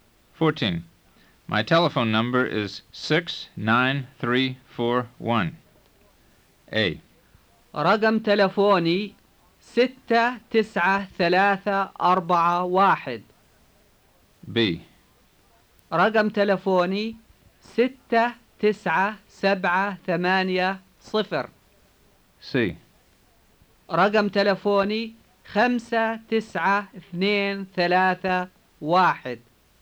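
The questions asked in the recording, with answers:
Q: My telephone number is 69341.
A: A: رقم تلفوني 69341.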